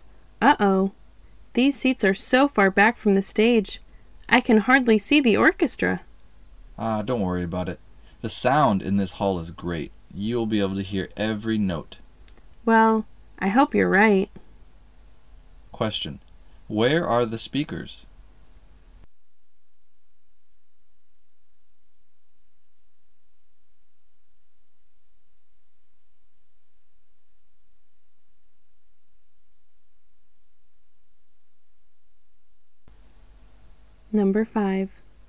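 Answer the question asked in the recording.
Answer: In a concert hall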